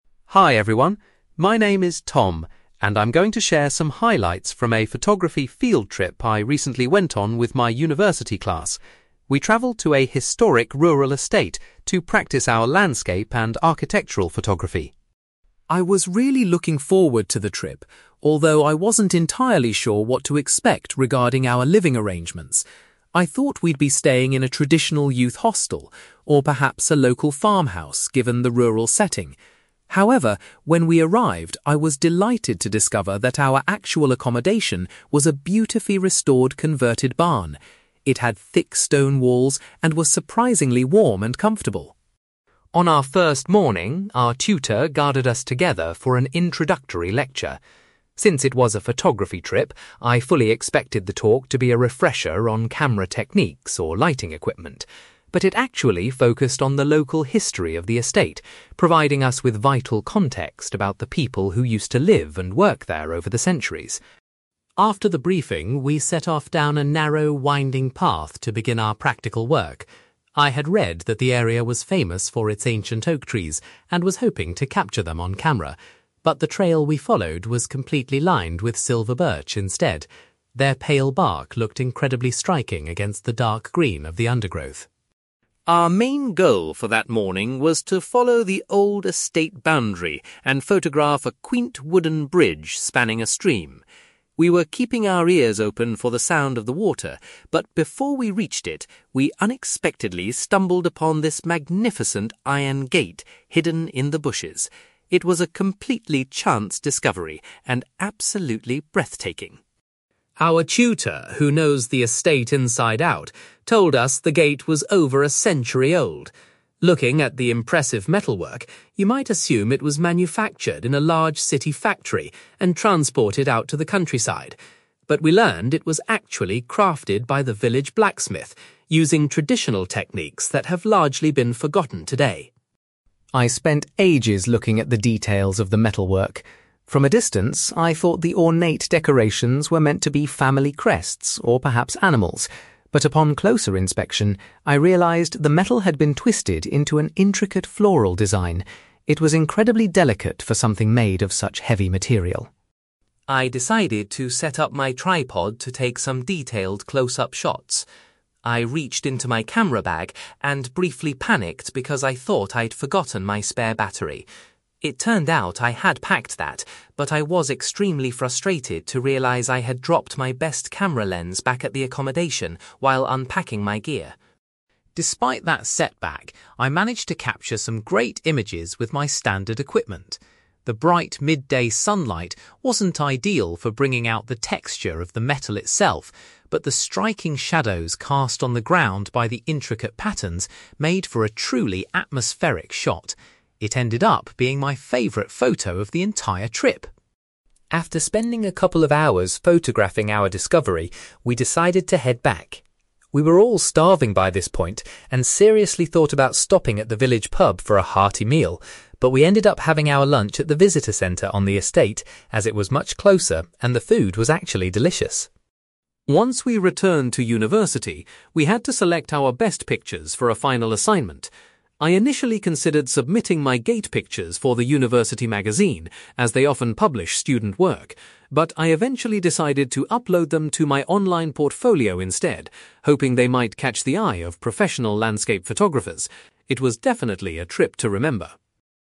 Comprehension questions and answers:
You will hear a young man called Tom talking about a photography field trip where his group discovered a century-old gate. For questions 9-18, complete the sentences with a word or short phrase.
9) Tom was surprised to discover that the group's accommodation was a (9)........................... rather than a youth hostel.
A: converted barn

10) The tutor's introductory lecture concentrated on the (10)........................... of the estate instead of photography skills.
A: local history

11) The walking path the students took was bordered by (11)........................... rather than oak trees.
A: silver birch

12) While walking towards a stream, the students unexpectedly found an old (12)........................... concealed by vegetation.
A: iron gate

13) Tom learned that the century-old structure had been produced by the (13)........................... and not in a factory.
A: village blacksmith

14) When Tom examined the structure closely, he noticed it featured a beautiful (14)........................... .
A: floral design

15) Tom was frustrated to realise that he had left his (15)........................... behind at the accommodation.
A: camera lens

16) Tom felt that the (16)........................... in his photographs created a very dramatic effect.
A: shadows

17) The group ultimately decided to eat their lunch at the (17)........................... on the estate.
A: visitor centre

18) Tom chose to showcase his favourite images of the discovery on his (18)........................... .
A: online portfolio

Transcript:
Tom: Hi everyone. My name is Tom, and I'm going to share some highlights from a photography field trip I recently went on with my university class. We travelled to a historic rural estate to practise our landscape and architectural photography.
I was really looking forward to the trip, although I wasn't entirely sure what to expect regarding our living arrangements. I thought we'd be staying in a traditional youth hostel, or perhaps a local farmhouse given the rural setting. However, when we arrived, I was delighted to discover that our actual accommodation was a beautifully restored converted barn. It had thick stone walls and was surprisingly warm and comfortable.
On our first morning, our tutor gathered us together for an introductory lecture. Since it was a photography trip, I fully expected the talk to be a refresher on camera techniques or lighting equipment. But it actually focused on the local history of the estate, providing us with vital context about the people who used to live and work there over the centuries.
After the briefing, we set off down a narrow, winding path to begin our practical work. I had read that the area was famous for its ancient oak trees and was hoping to capture them on camera, but the trail we followed was completely lined with silver birch instead. Their pale bark looked incredibly striking against the dark green of the undergrowth.
Our main goal for that morning was to follow the old estate boundary and photograph a quaint wooden bridge spanning a stream. We were keeping our ears open for the sound of the water, but before we reached it, we unexpectedly stumbled upon this magnificent iron gate hidden in the bushes. It was a completely chance discovery and absolutely breathtaking.
Our tutor, who knows the estate inside out, told us the gate was over a century old. Looking at the impressive metalwork, you might assume it was manufactured in a large city factory and transported out to the countryside. But we learned it was actually crafted by the village blacksmith, using traditional techniques that have largely been forgotten today.
I spent ages looking at the details of the metalwork. From a distance, I thought the ornate decorations were meant to be family crests or perhaps animals. But upon closer inspection, I realised the metal had been twisted into an intricate floral design. It was incredibly delicate for something made of such heavy material.
I decided to set up my tripod to take some detailed close-up shots. I reached into my camera bag and briefly panicked because I thought I'd forgotten my spare battery. It turned out I had packed that, but I was extremely frustrated to realise I had dropped my best camera lens back at the accommodation while unpacking my gear.
Despite that setback, I managed to capture some great images with my standard equipment. The bright midday sunlight wasn't ideal for bringing out the texture of the metal itself, but the striking shadows cast on the ground by the intricate patterns made for a truly atmospheric shot. It ended up being my favourite photo of the entire trip.
After spending a couple of hours photographing our discovery, we decided to head back. We were all starving by this point and seriously thought about stopping at the village pub for a hearty meal, but we ended up having our lunch at the visitor centre on the estate, as it was much closer and the food was actually delicious.
Once we returned to university, we had to select our best pictures for a final assignment. I initially considered submitting my gate pictures for the university magazine, as they often publish student work. But I eventually decided to upload them to my online portfolio instead, hoping they might catch the eye of professional landscape photographers. It was definitely a trip to remember.

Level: B2